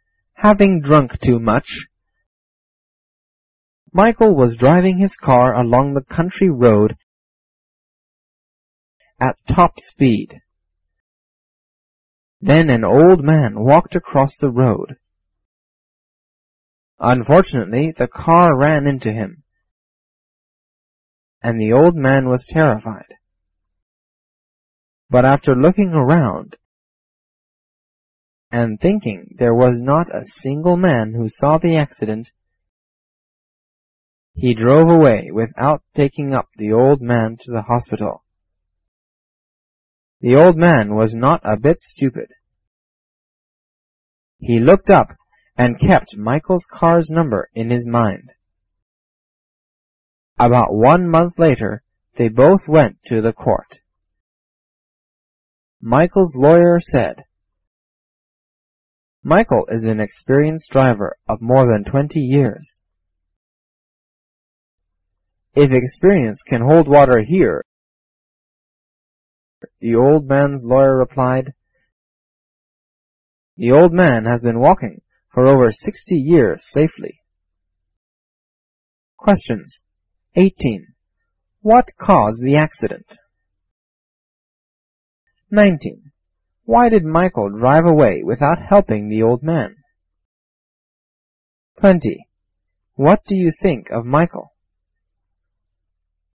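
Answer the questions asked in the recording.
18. Michael drove at top speed after drinking too much
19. He thought nobody saw the accident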